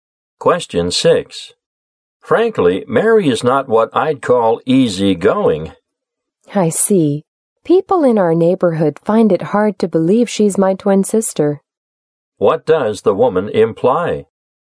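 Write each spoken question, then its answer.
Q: What does the woman imply?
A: She and her twin sister Mary are very different in personality.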